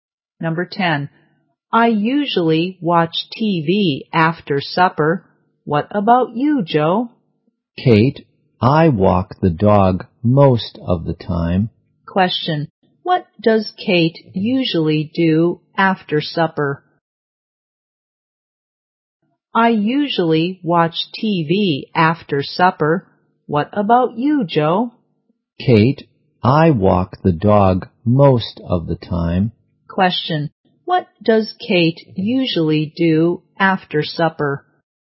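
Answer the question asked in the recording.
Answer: Watches TV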